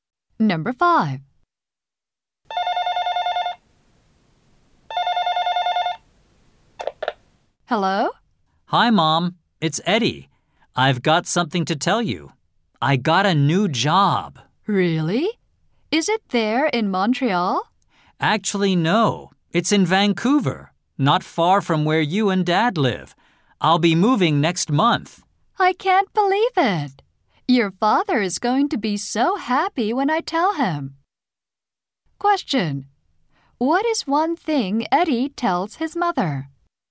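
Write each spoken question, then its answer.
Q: What is one thing Eddie tells his mother?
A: He got a new job in Vancouver and will move there next month.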